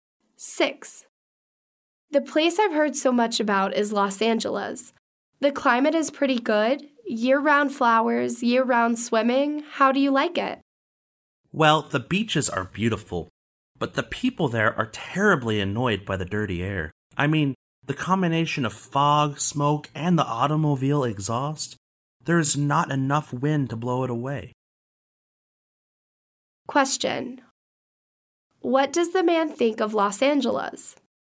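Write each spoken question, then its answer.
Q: What does the man think of Los Angeles?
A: The beaches are beautiful but the air is polluted.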